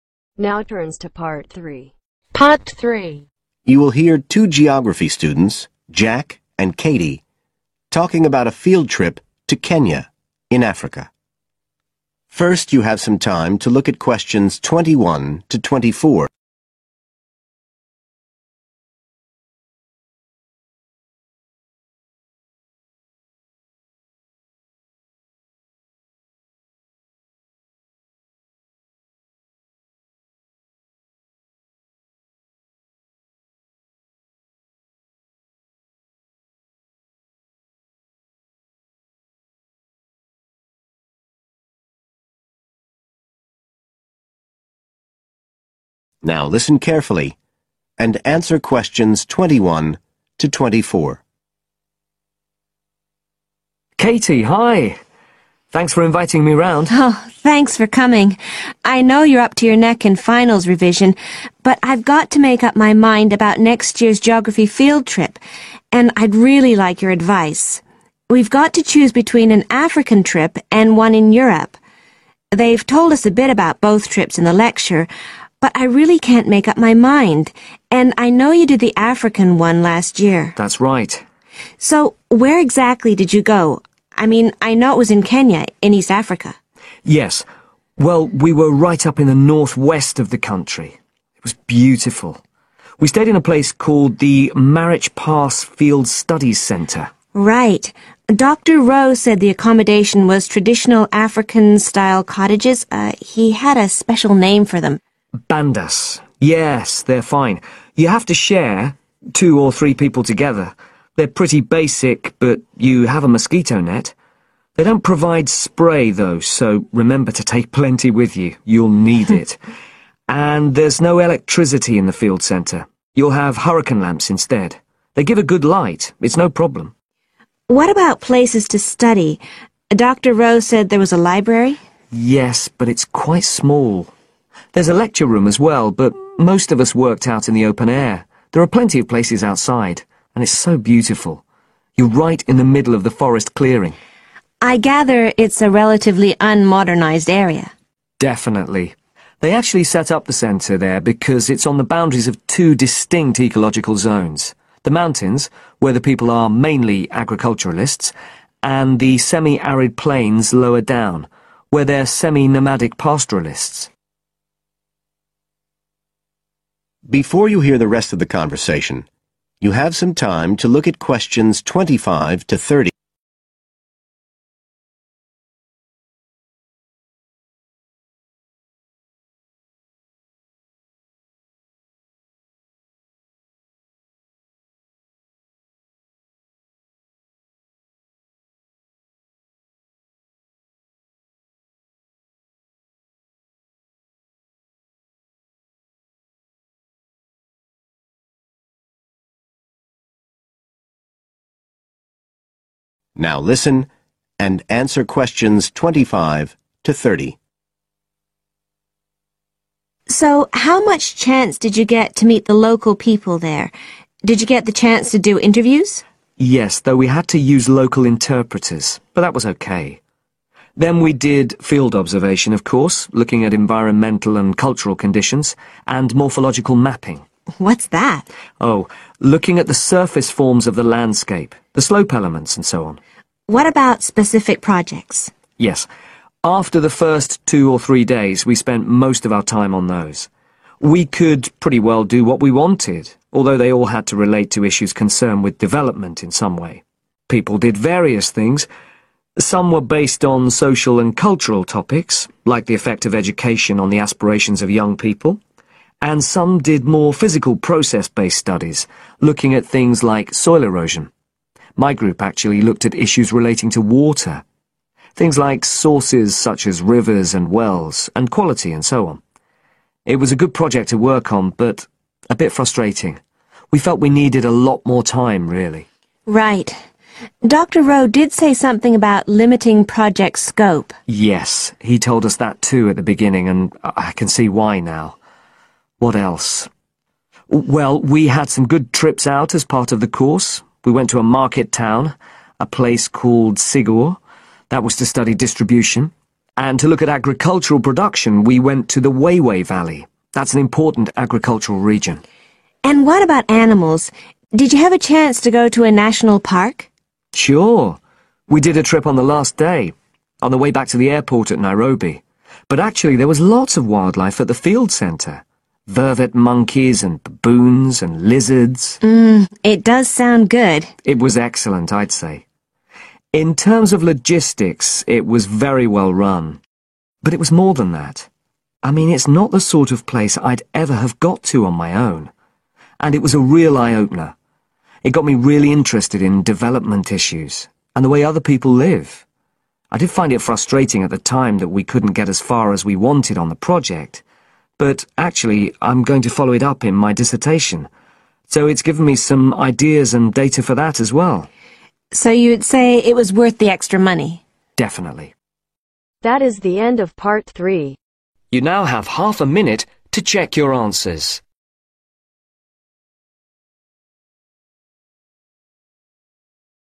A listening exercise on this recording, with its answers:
Complete the notes below. Write NO MORE THAN THREE WORDS for each answer.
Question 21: Area of country: the 21.............. of Kenya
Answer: Northwest/ north-west

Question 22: Marich Pass Field Studies Centre in traditional 'bandas' (bring mosquito 22..............)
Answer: Spray

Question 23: study areas: 23.............., lecture room, outdoor areas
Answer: (a) (small) library

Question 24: Type of environment: both 24.............. and semi-arid plains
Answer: Mountains

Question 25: 25..............(environment and culture)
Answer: Field observation

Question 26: projects (all connected with 26..............issues)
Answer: Development

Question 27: Jack's group did project on: 27..............supply and quality issues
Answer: Water

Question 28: to Sigor (a 28..............) to study distribution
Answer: Market town

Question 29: to a 29..............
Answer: National park

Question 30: provided input for his 30..............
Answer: Dissertation